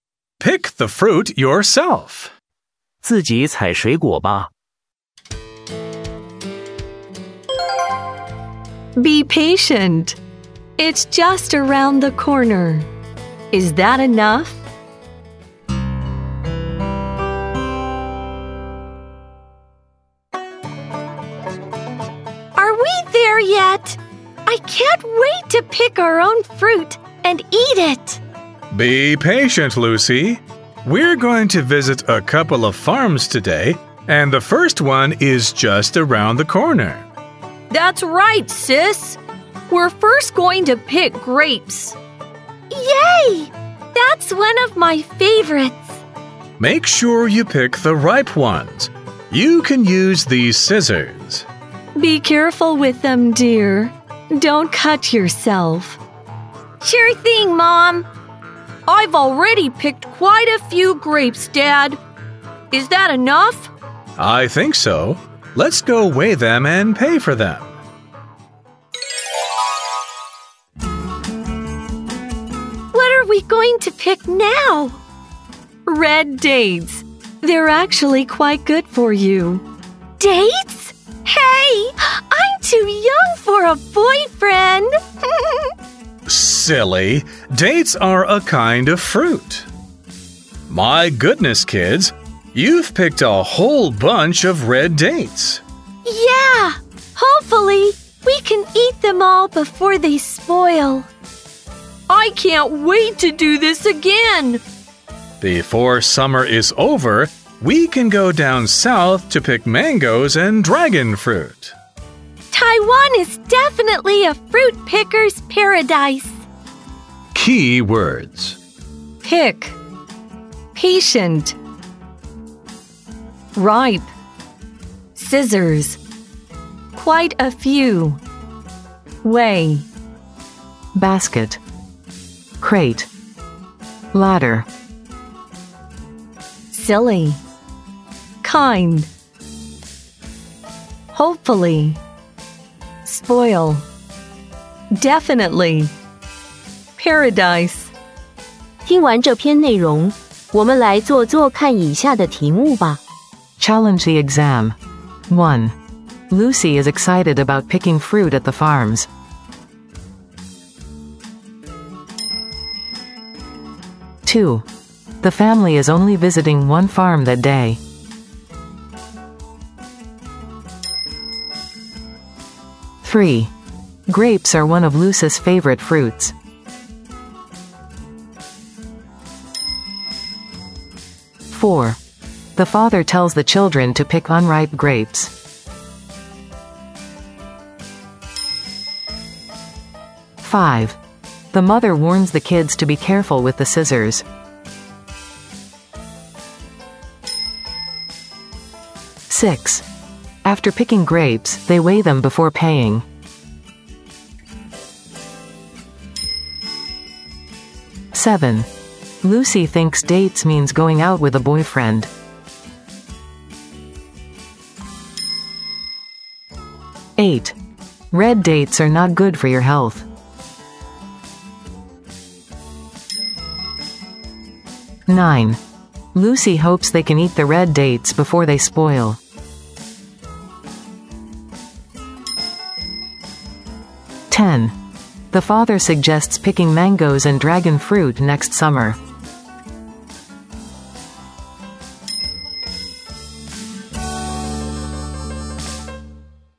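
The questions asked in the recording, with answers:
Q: Lucy is excited about picking fruit at the farms.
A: True

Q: The family is only visiting one farm that day.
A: False

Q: Grapes are one of Lucy's favorite fruits.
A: True

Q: The father tells the children to pick unripe grapes.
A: False

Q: The mother warns the kids to be careful with the scissors.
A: True

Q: After picking grapes, they weigh them before paying.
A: True

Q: Red dates are not good for your health.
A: False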